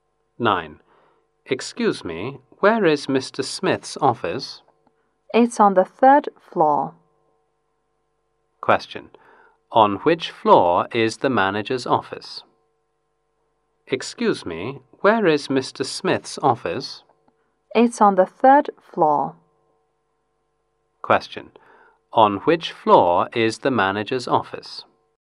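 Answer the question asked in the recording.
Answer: The third floor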